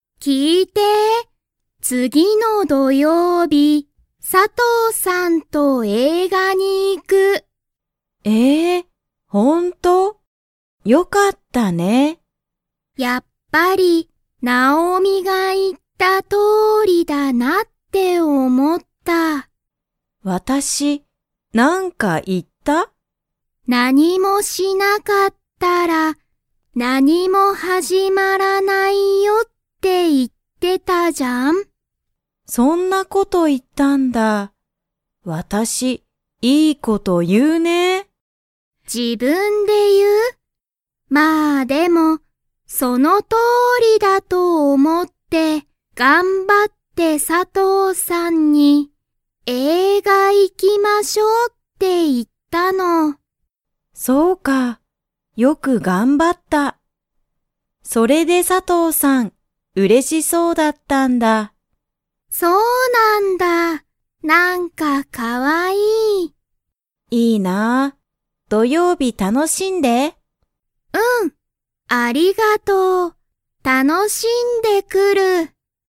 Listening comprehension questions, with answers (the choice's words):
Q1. リサは佐藤(さとう)さんと、____に映画(えいが)を見(み)に行(い)く。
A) 日曜日(にちようび)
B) 月曜日(げつようび)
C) 金曜日(きんようび)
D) 土曜日(どようび)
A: 土曜日(どようび)

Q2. 佐藤(さとう)さんは、嬉(うれ)しそうでしたか?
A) はい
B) いいえ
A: はい

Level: Level 2